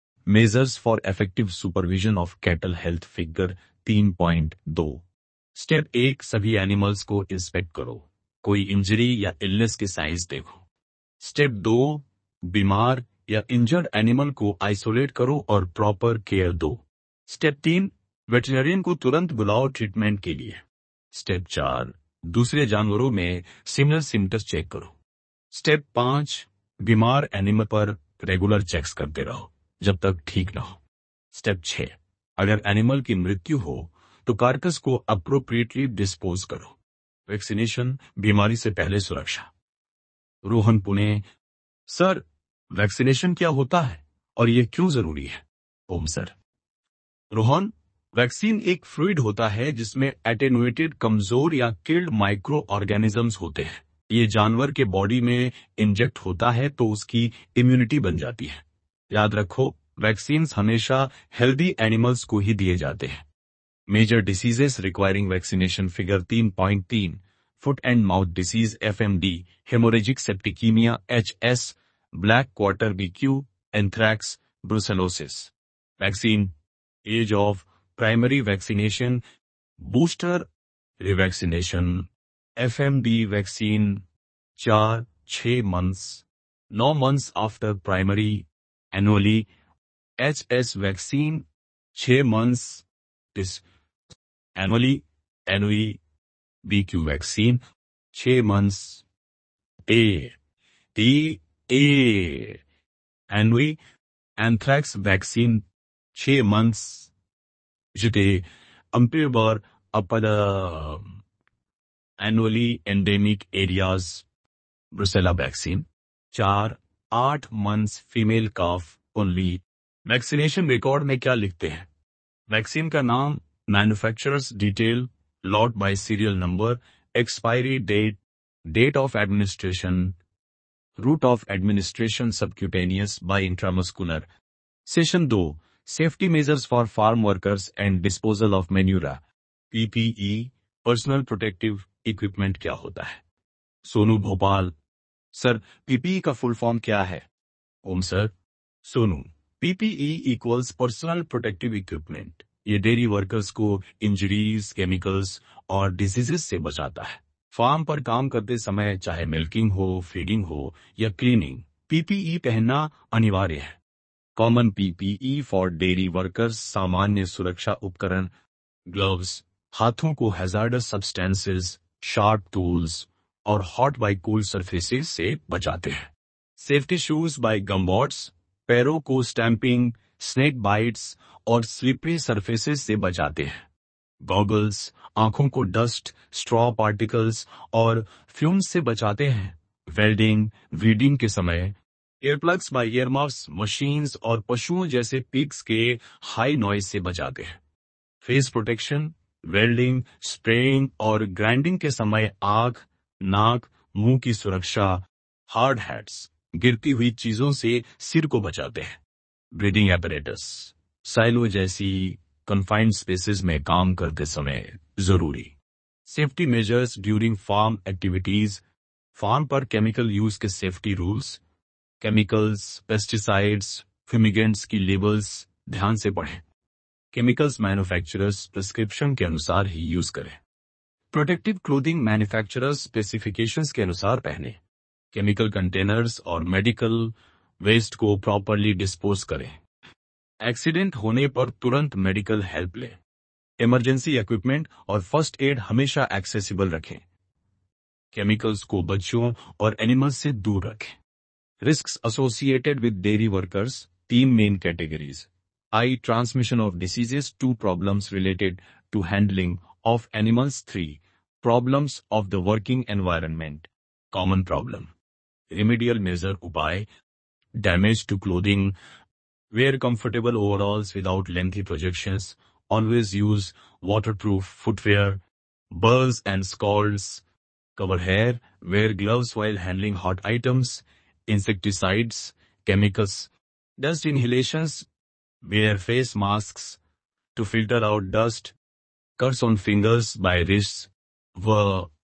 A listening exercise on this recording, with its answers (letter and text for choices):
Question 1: The dairy farm worker wears protective equipment to protect ___.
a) eyes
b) face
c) head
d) All of these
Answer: d) All of these

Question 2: Which condition is associated with the risk of a dairy farm worker?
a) Transmission of diseases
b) Handling of animals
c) Working environment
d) All of the above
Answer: d) All of the above

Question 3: PPE stands for ___.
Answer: Personal Protective Equipment

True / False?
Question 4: Vaccination is done to prevent the animals from diseases.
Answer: True

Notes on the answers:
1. PPE head, face, eyes सभी को protect करता है।
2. तीनों risks dairy workers को होती हैं।
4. Vaccination का purpose disease prevention है।

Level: Class 11